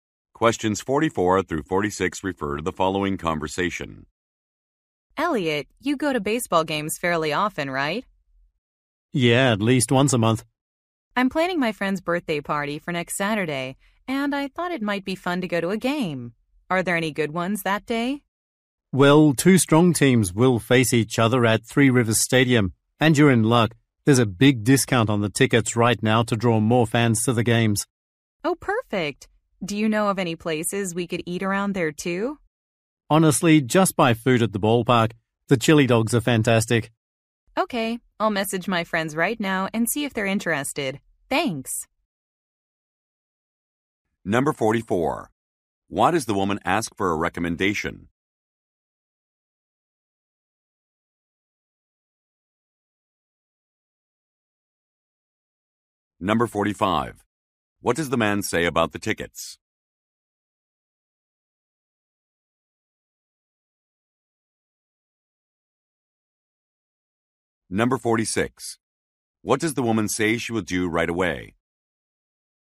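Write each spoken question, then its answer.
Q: Why does the woman ask for a recommendation?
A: She is planning a friend's birthday party

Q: What does the man say about the tickets?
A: They are heavily discounted

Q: What does the woman say she will do right away?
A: Message her friends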